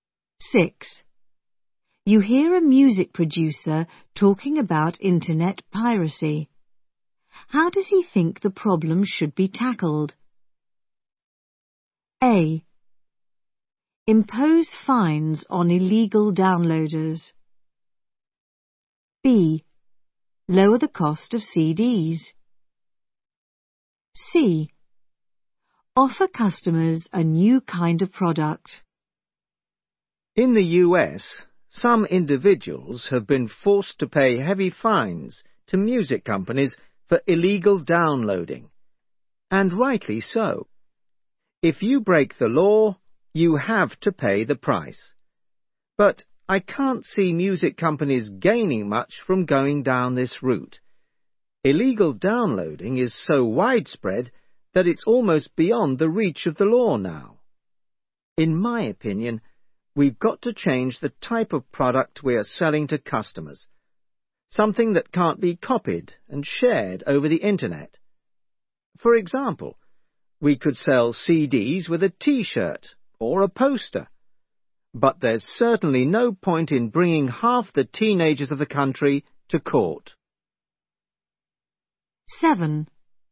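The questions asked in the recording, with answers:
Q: How does he think the problem should be tackled?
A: C: Offer customers a new kind of product.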